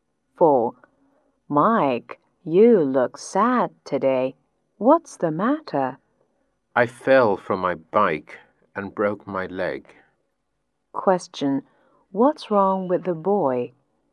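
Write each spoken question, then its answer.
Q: What's wrong with the boy?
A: He fell from his bike and broke his leg.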